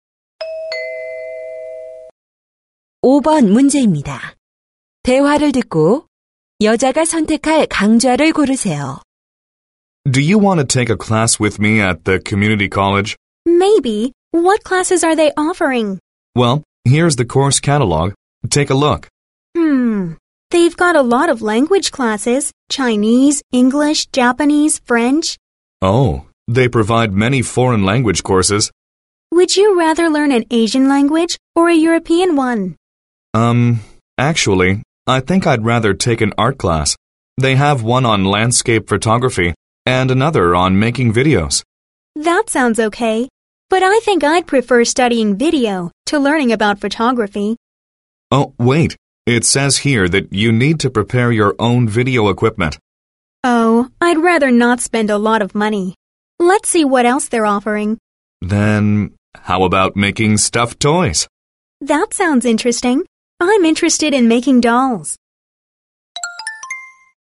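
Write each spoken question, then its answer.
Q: 대화를 듣고 여자가 선택할 강좌를 고르세요.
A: 봉제 인형 만들기 강좌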